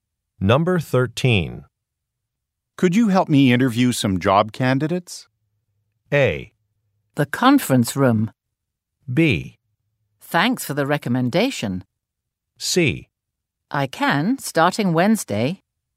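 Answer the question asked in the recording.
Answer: C: I can, starting Wednesday.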